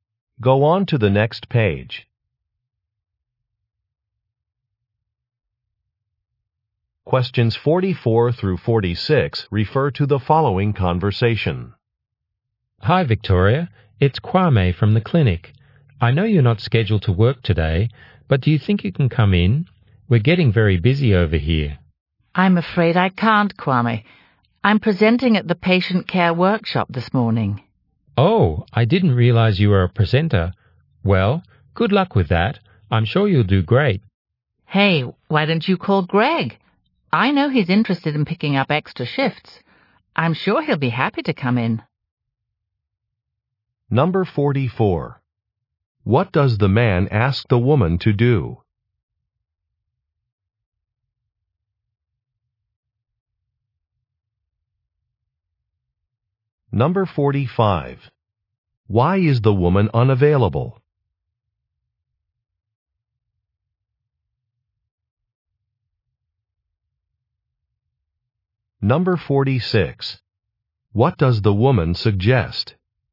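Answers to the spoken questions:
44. Come in to work today
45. She is presenting at a patient care workshop
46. Calling Greg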